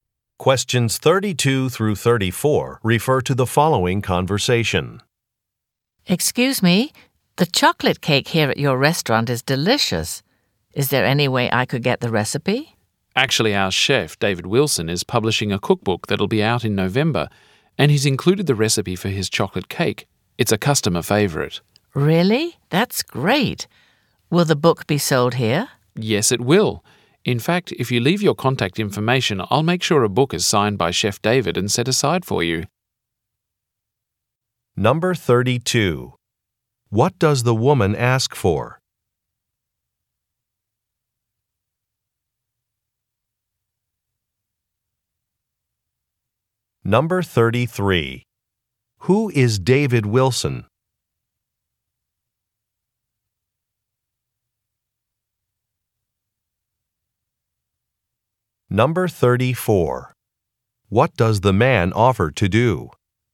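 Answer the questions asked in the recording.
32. The recipe for the chocolate cake
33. The restaurant's chef
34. Set aside a signed copy of the cookbook for her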